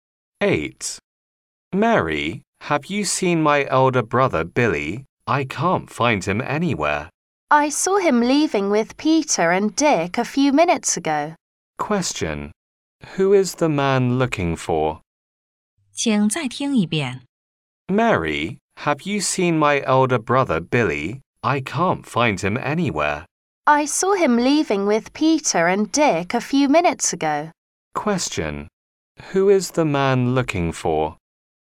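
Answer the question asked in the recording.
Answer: His elder brother, Billy.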